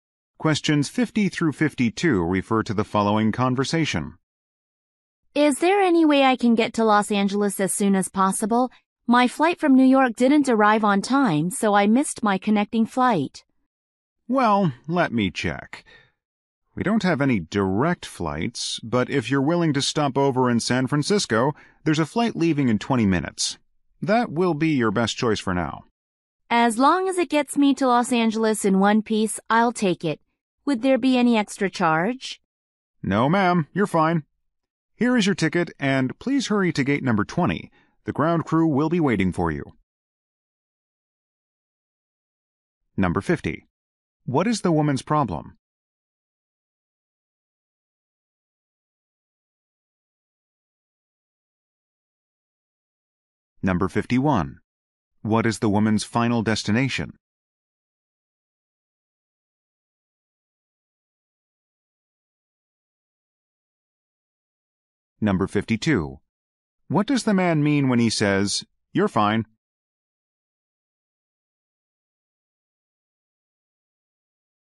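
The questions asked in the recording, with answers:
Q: What is the woman's problem?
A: She missed her connecting flight

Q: What is the woman's final destination?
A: Los Angeles

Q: What does the man mean when he says, "You're fine"?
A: There is no extra charge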